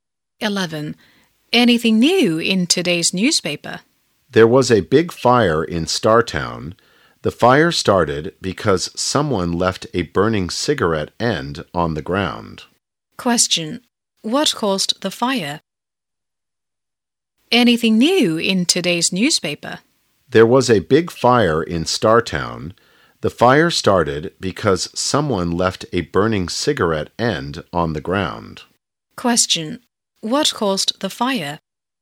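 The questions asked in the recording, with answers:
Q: what caused the fire?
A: A burning cigarette end left on the ground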